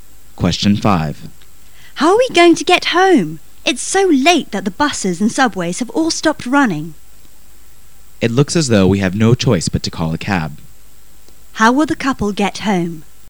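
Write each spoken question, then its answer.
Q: How will the couple get home?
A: By taxi

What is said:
[解析] W: How are we going to get home? It's so late that the buses and subways have all stopped ming. M: It looks as though we have no choice but to call a cab. Q: How will the Couple get home?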